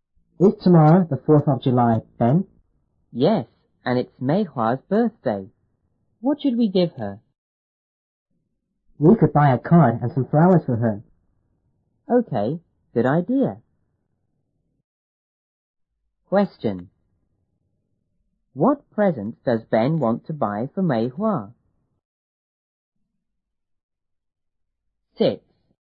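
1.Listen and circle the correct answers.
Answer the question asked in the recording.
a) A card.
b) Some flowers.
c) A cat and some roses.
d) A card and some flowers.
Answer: d) A card and some flowers.

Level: 初中英语广州版1B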